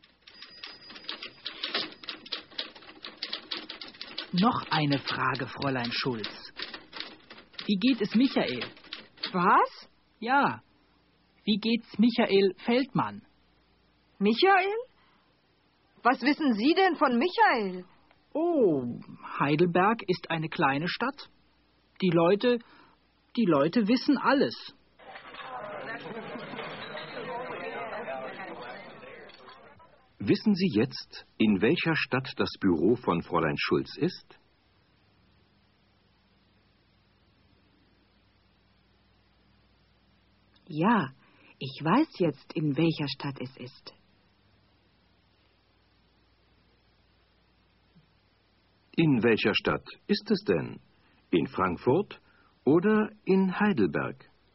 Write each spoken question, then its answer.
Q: In welcher Stadt ist es denn?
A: Es ist in Heidelberg.